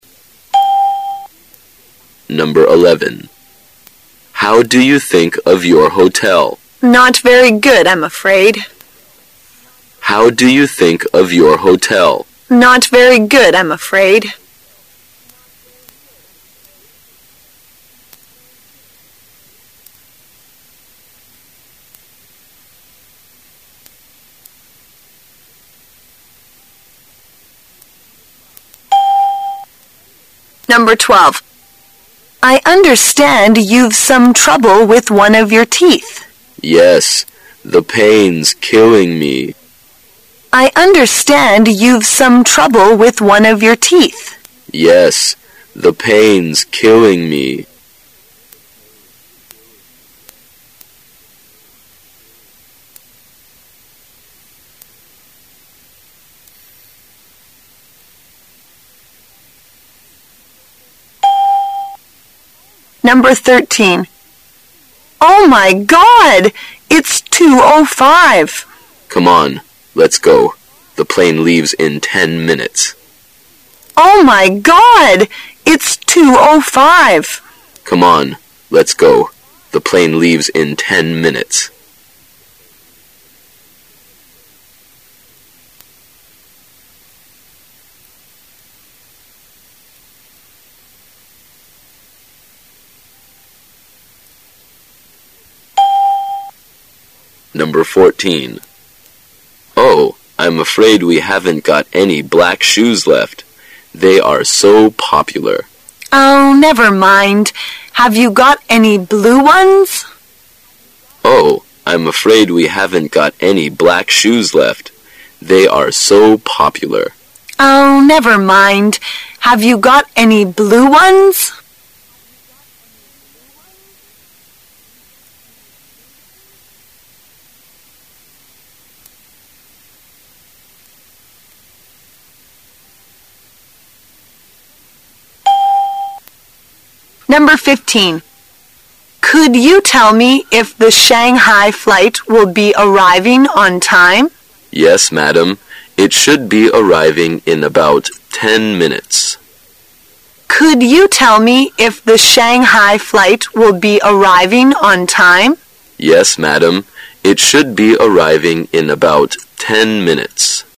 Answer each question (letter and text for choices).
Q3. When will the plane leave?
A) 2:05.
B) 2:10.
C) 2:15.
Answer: C) 2:15.

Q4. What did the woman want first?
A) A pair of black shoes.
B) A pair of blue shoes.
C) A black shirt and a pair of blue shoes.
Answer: A) A pair of black shoes.

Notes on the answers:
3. [解析] 现在2:05,飞机要在十分钟后起飞,所以飞机起飞的时间为2:15。故本题答案为C。 [听力原文] W: Oh, my God! It's2:05. M: Come on. Let's go. The plane leaves in ten minutes.
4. [解析] 根据男士所说的"I'm afraid we haven't got any black shoes left."可知女士首先要的一双黑鞋,故本题答案为A。 [听力原文] M: Oh, I'm afraid we haven't got any black shoes left. They are so popular. W: Oh, never mind. Have you got any blue ones?